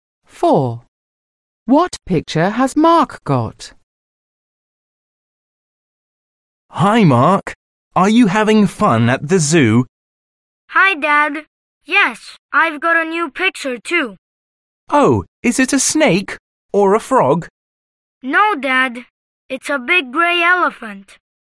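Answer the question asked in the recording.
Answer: A big grey elephant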